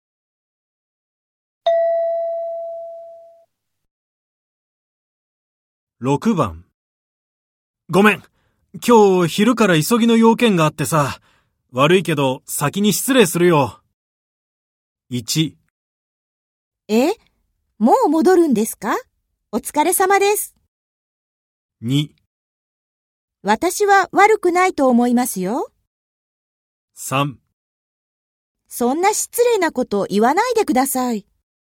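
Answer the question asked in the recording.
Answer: 1: え?もう戻るんですか?お疲れ様です。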